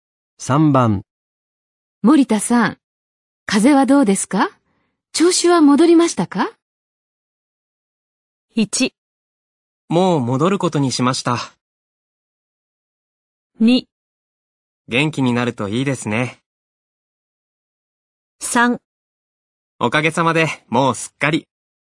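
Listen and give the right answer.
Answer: 3: おかげさまでもうすっかり。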